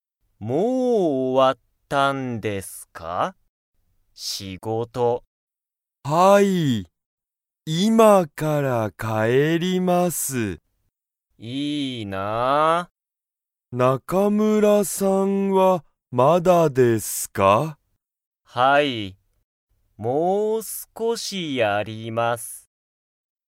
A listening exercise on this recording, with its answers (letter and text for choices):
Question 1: 中村(なかむら)さんは、もう仕事(しごと)が終(お)わりましたか?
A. はい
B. いいえ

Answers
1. B. いいえ

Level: Level 1